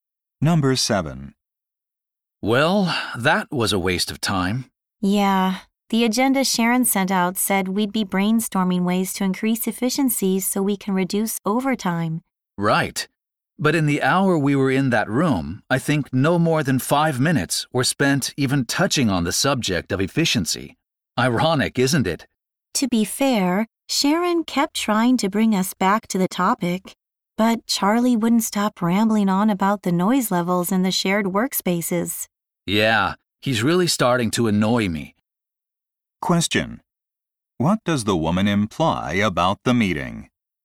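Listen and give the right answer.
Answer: It went off topic because Charlie kept complaining about noise instead of discussing efficiency.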